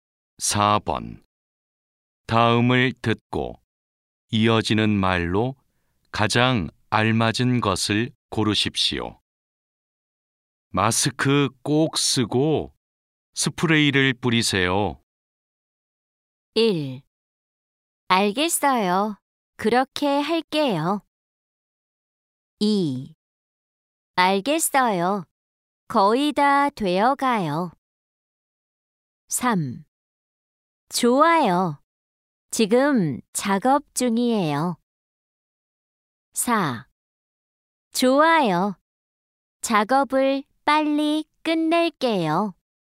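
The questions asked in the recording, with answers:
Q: 마스크 꼭 쓰고 스프레이를 뿌리세요.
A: 1: 알겠어요. 그렇게 할게요.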